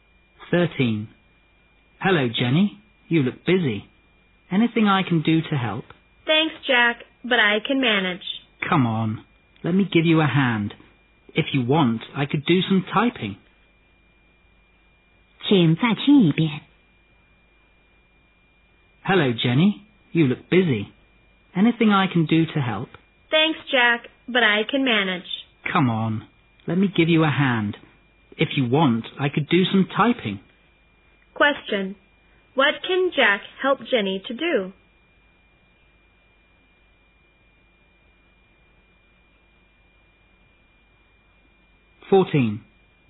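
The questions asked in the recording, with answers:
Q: Question. What can Jack help Jenny to do?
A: Do some typing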